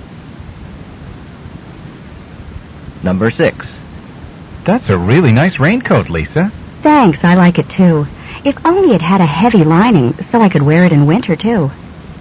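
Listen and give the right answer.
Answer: She wishes the raincoat were warm enough for winter.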